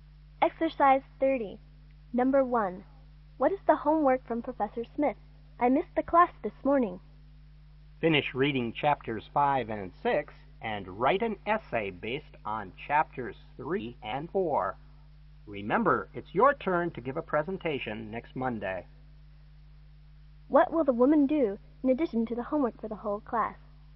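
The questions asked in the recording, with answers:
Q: What will the woman do in addition to the homework for the whole class?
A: Give a presentation next Monday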